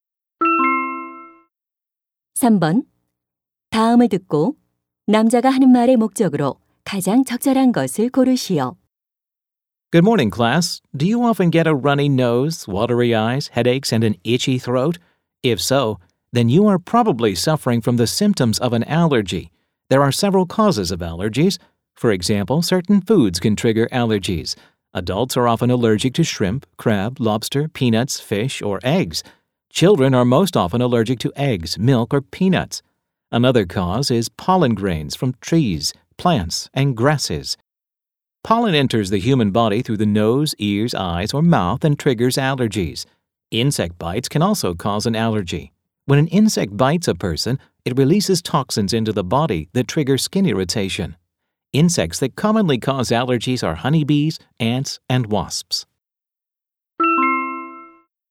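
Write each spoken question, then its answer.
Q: 다음을 듣고 남자가 하는 말의 목적으로 가장 적절한 것을 고르시오.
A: 알레르기의 원인을 설명하려고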